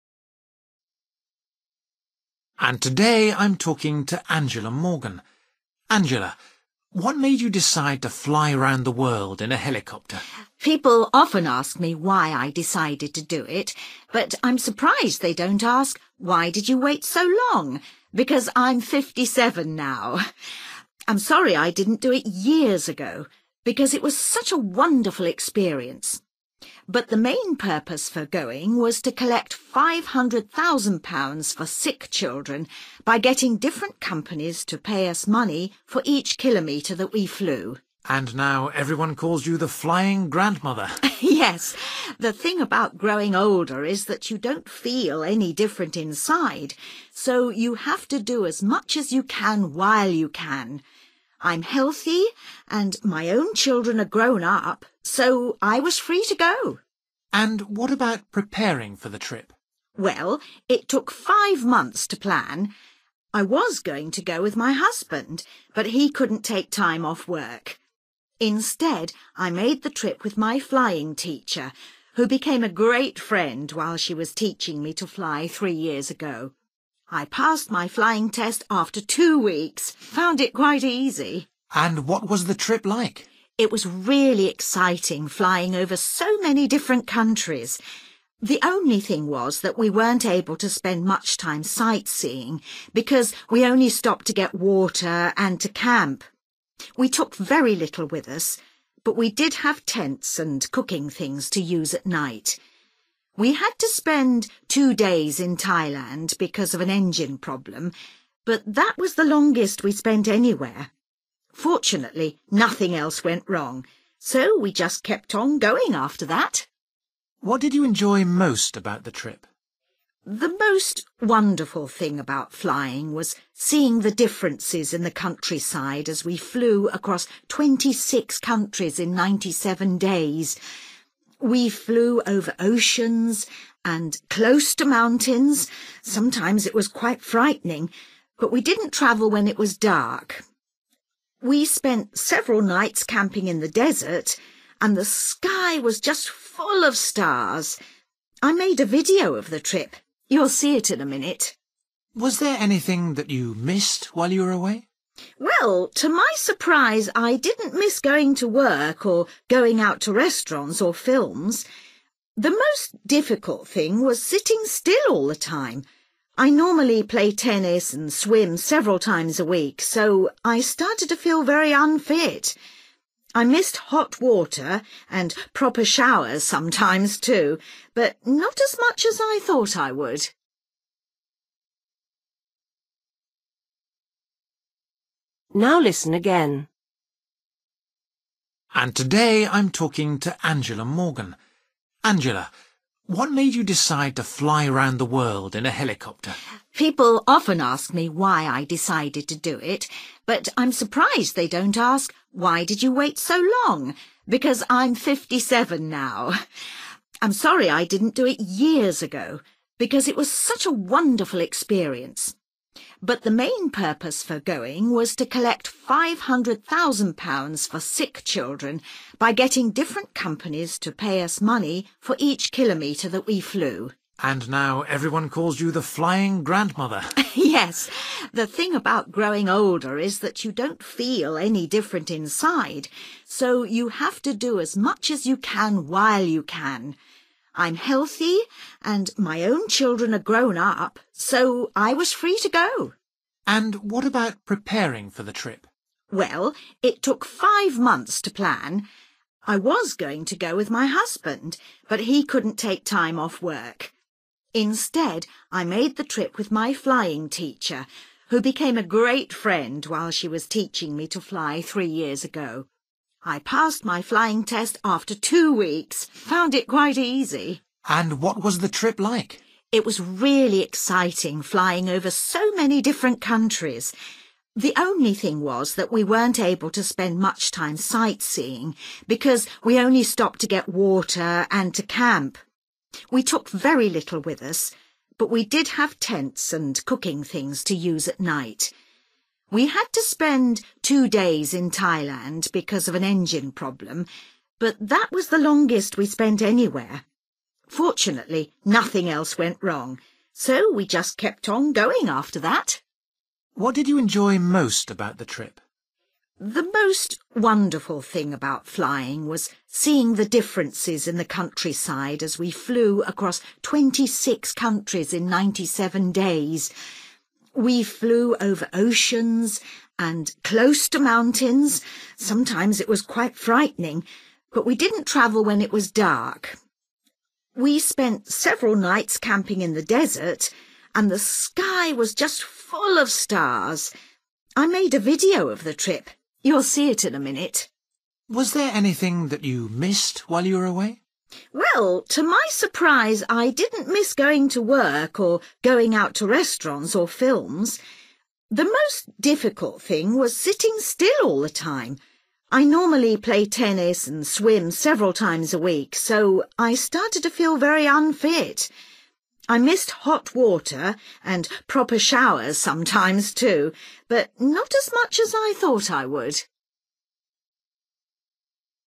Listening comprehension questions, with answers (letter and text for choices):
For each question, choose the correct answer.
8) The main reason for Angela's trip was to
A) make money for her business.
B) make money for other people.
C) have an exciting adventure.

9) What does Angela say about her life now?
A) She feels much older.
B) She likes to be active and busy.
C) She is lonely without her children.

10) When Angela had flying lessons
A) her course lasted five months.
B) her husband took lessons as well.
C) she got to know her teacher well.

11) During the trip, Angela and her teacher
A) did very little sightseeing.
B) carried all the water they needed.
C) had engine problems several times.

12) What did Angela enjoy most about the trip?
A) flying at night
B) walking in the desert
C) watching the changes in the scenery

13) What did Angela miss most while she was away?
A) modern bathrooms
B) regular exercise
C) interesting entertainment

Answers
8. B) make money for other people.
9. B) She likes to be active and busy.
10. C) she got to know her teacher well.
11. A) did very little sightseeing.
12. C) watching the changes in the scenery
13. B) regular exercise

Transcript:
Man: And today I'm talking to Angela Morgan. Angela, what made you decide to fly round the world in a helicopter?
Woman: People often ask me why I decided to do it but I'm surprised they don't ask 'Why did you wait so long?' because I'm 57 now! I'm sorry I didn't do it years ago, because it was such a wonderful experience. But the main purpose for going was to collect £500,000 for sick children by getting different companies to pay us money for each kilometre that we flew.
Man: And now everyone calls you the flying grandmother!
Woman: Yes, the thing about growing older is that you don't feel any different inside, so you have to do as much as you can while you can. I'm healthy, and my own children are grown up, so I was free to go.
Man: And what about preparing for the trip?
Woman: Well, it took five months to plan. I was going to go with my husband, but he couldn't take time off work. Instead I made the trip with my flying teacher who became a great friend while she was teaching me to fly three years ago. I passed my flying test after two weeks; found it quite easy.
Man: And what was the trip like?
Woman: It was really exciting flying over so many different countries. The only thing was that we weren't able to spend much time sightseeing because we only stopped to get water and to camp. We took very little with us, but we did have tents and cooking things to use at night. We had to spend two days in Thailand because of an engine problem, but that was the longest we spent anywhere. Fortunately nothing else went wrong, so we just kept on going after that.
Man: What did you enjoy most about the trip?
Woman: The most wonderful thing about flying was seeing the differences in the countryside as we flew across 26 countries in 97 days. We flew over oceans and close to mountains; sometimes it was quite frightening, but we didn't travel when it was dark. We spent several nights camping in the desert and the sky was just full of stars. I made a video of the trip; you'll see it in a minute.
Man: Was there anything that you missed while you were away?
Woman: Well, to my surprise I didn't miss going to work or going out to restaurants or films. The most difficult thing was sitting still all the time; I normally play tennis and swim several times a week, so I started to feel very unfit. I missed hot water and proper showers sometimes too, but not as much as I thought I would!

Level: B1